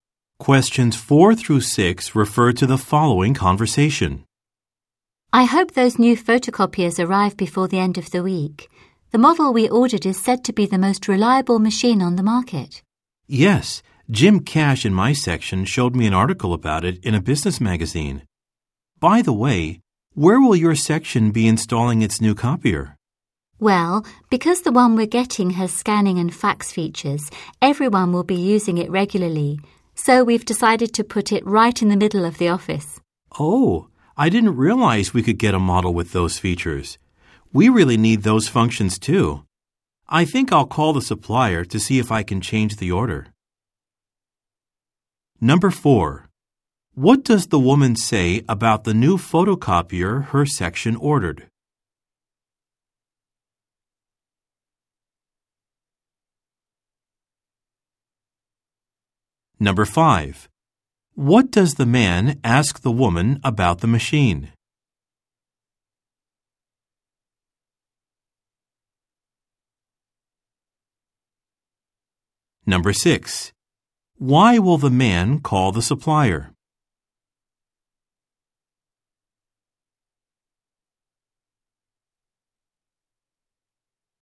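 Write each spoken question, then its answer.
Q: What does the man ask the woman about the machine?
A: Where her section will install it

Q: Why will the man call the supplier?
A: To change his order to a model with scanning and fax features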